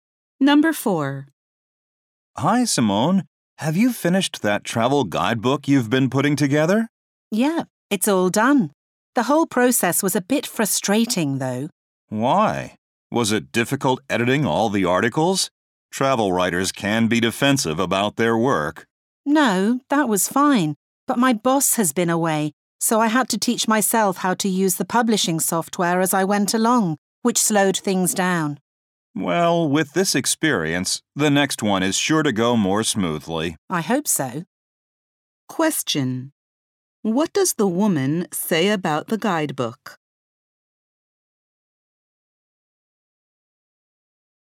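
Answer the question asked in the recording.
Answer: It took longer because she had to teach herself the publishing software.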